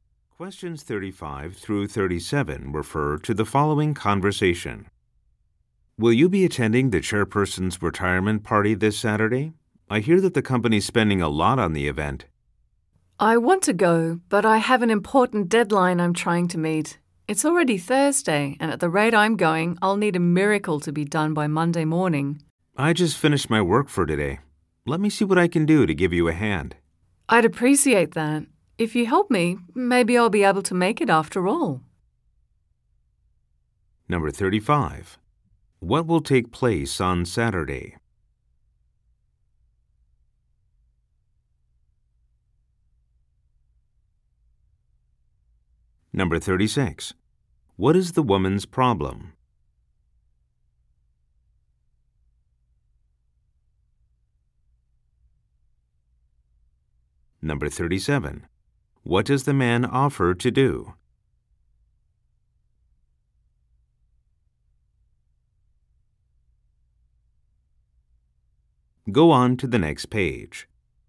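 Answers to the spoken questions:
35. The chairperson's retirement party
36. She has an important deadline to meet by Monday
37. Help her with her work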